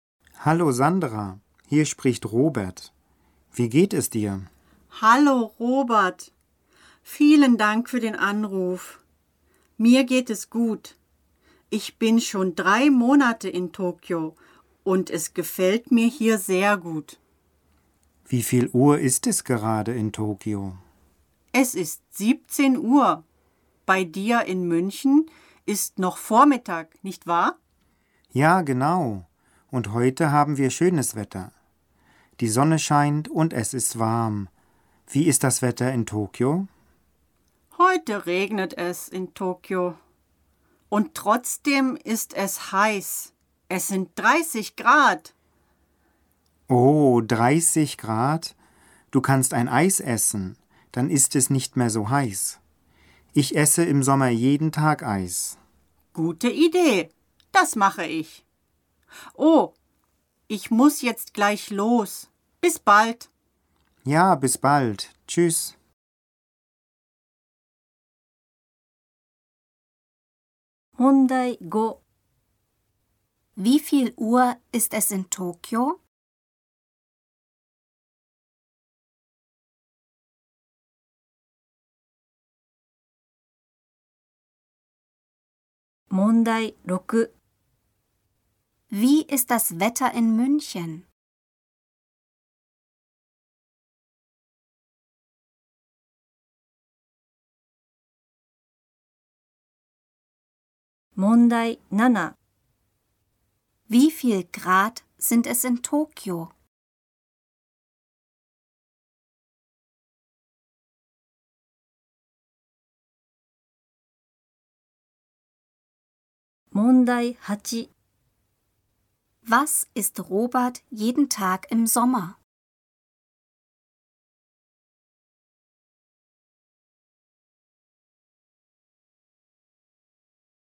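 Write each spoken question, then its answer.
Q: Wie viel Uhr ist es in Tokio?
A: 17 Uhr

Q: Wie ist das Wetter in München?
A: Die Sonne scheint und es ist warm.

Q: Wie viel Grad sind es in Tokio?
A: 30 Grad

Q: Was ist Robert jeden Tag im Sommer?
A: Eis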